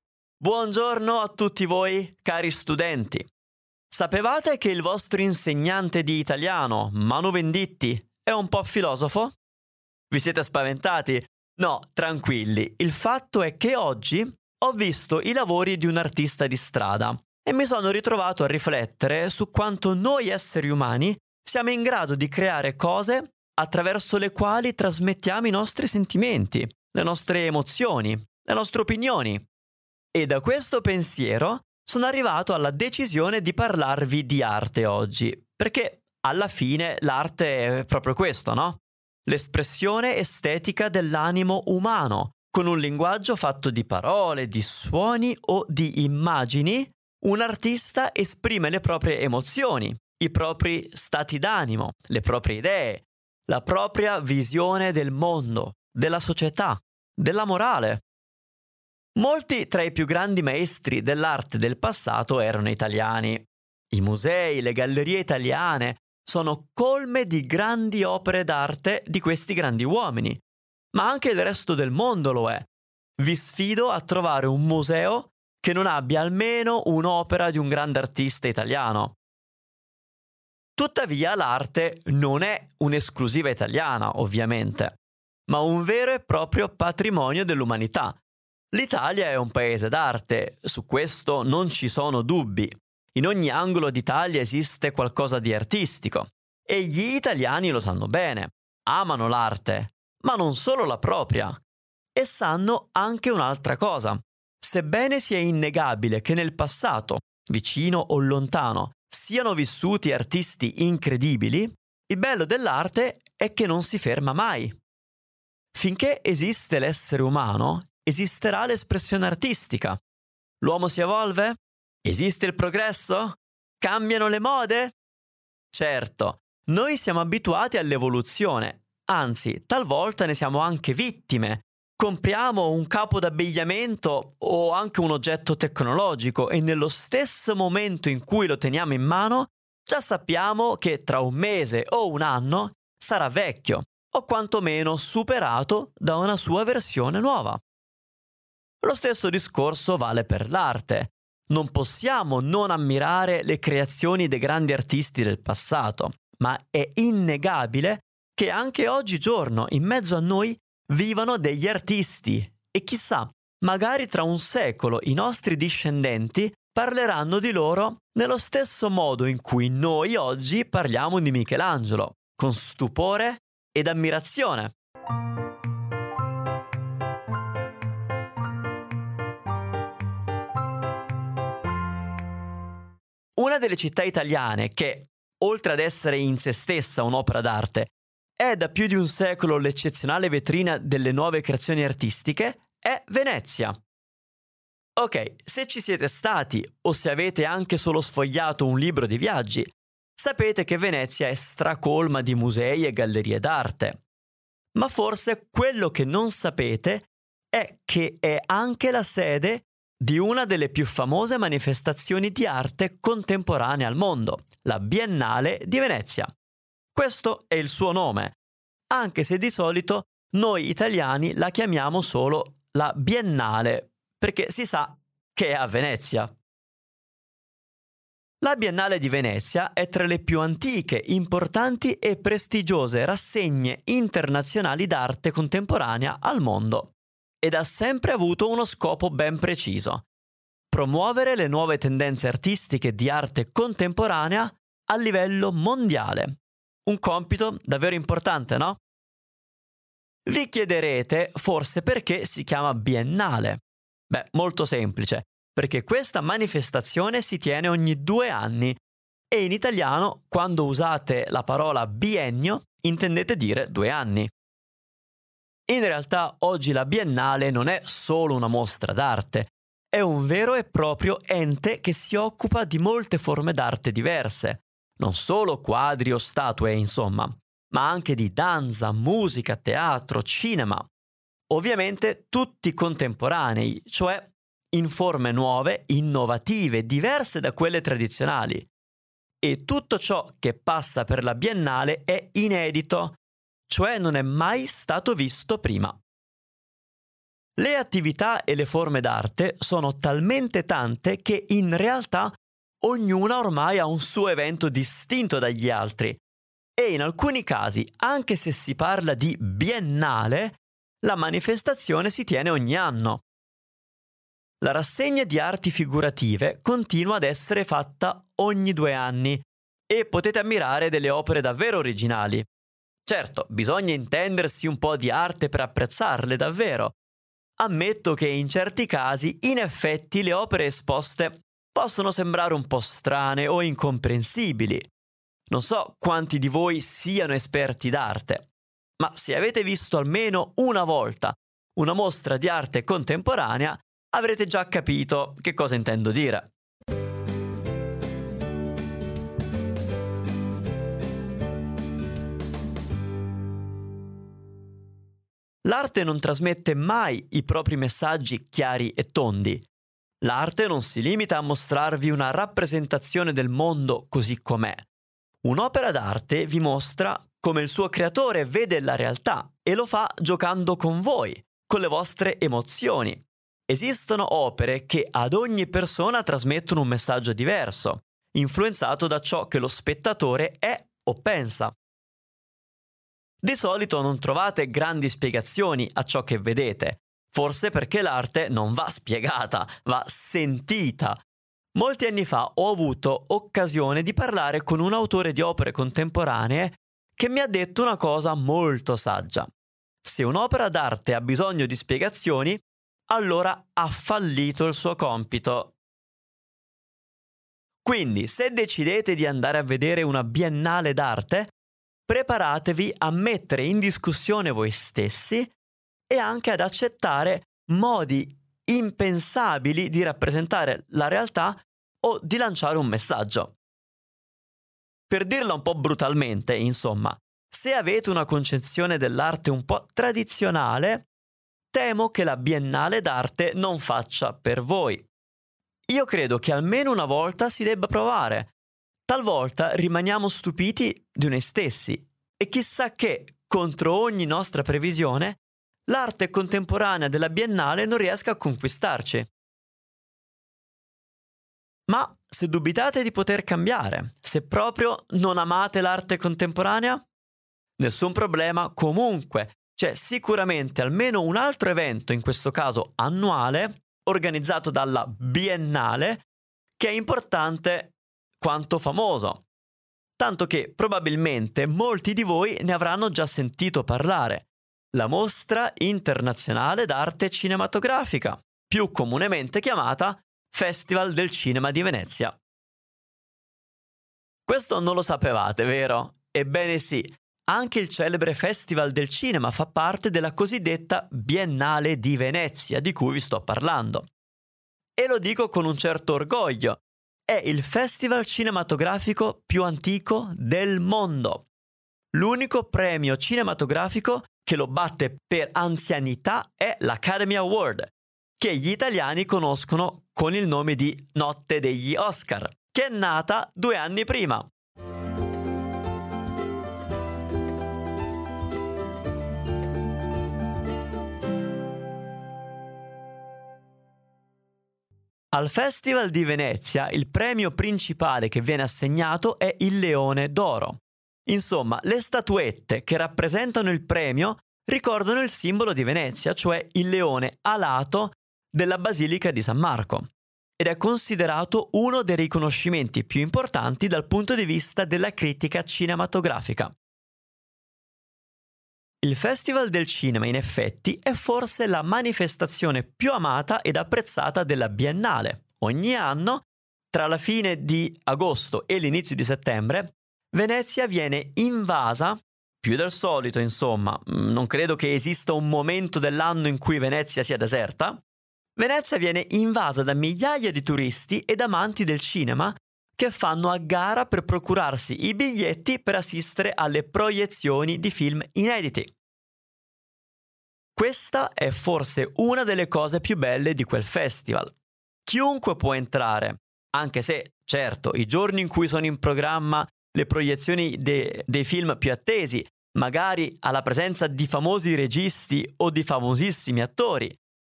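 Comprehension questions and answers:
Here are your TRUE/ FALSE Comprehension questions.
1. Gli italiani non sono interessati all'arte di altri paesi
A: Falso

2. La Biennale d'arte si tiene ogni cinque anni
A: Falso

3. Non è semplice comprendere le opere di arte contemporanea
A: Vero

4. La Biennale è un ente che si occupa di molte forme d'arte diverse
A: Vero

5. Durante il festival cinematografico Venezia è molto affollata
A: Vero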